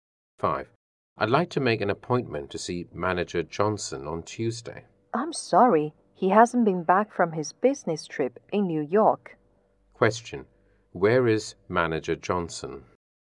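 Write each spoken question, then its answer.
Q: Where is Manager Johnson?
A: In New York, on a business trip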